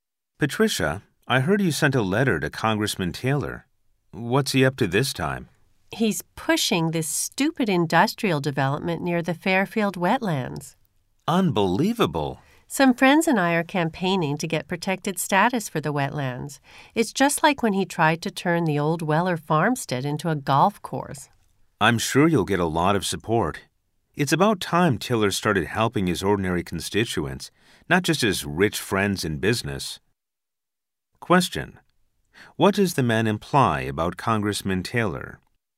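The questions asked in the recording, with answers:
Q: What does the man imply about Congressman Taylor?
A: He has a history of backing development projects that serve his rich business friends rather than ordinary constituents.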